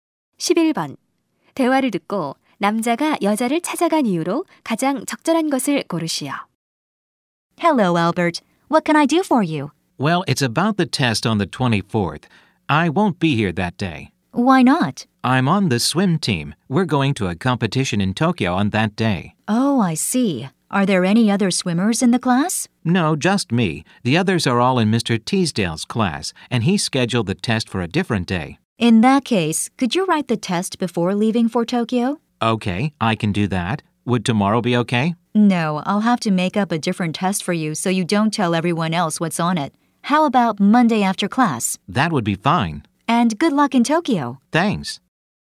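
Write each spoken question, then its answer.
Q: 대화를 듣고 남자가 여자를 찾아간 이유로 가장 적절한 것을 고르시오.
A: 시험 날짜를 바꾸기 위해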